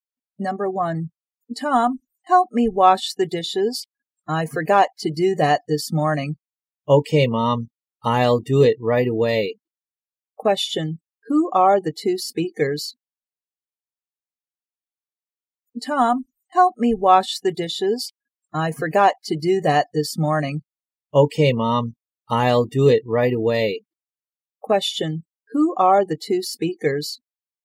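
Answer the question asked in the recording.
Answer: Mother and son (Tom)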